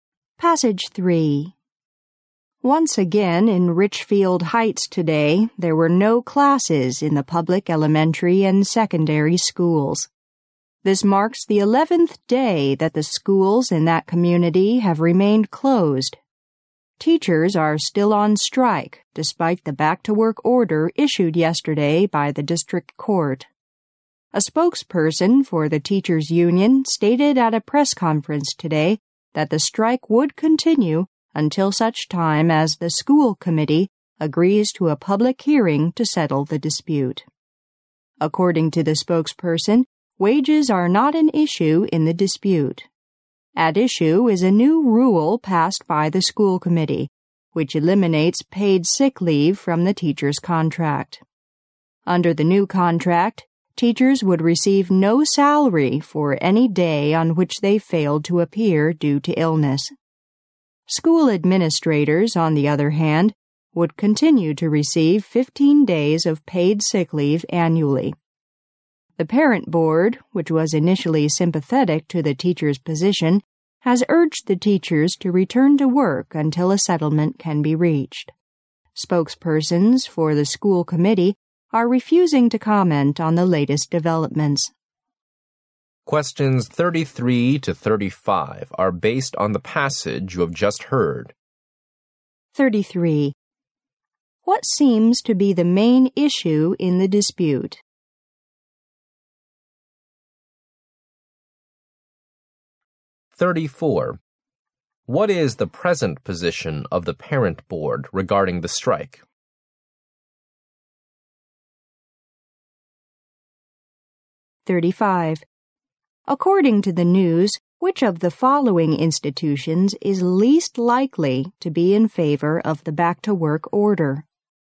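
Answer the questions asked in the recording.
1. Removing teachers' paid sick leave.
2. It urges the teachers to go back to work until a settlement is reached.
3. The teachers' union.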